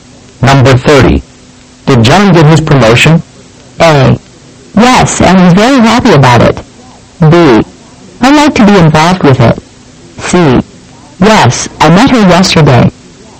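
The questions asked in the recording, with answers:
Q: Did John get his promotion?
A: A: Yes, and he's very happy about it.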